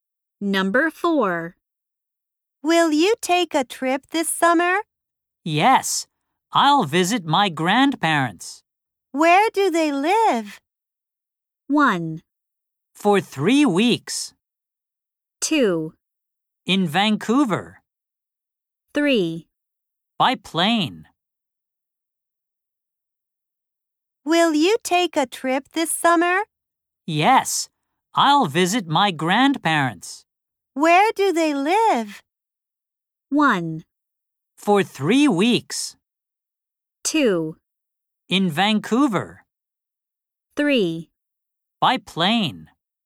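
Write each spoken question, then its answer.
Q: Where do they live?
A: 2: In Vancouver.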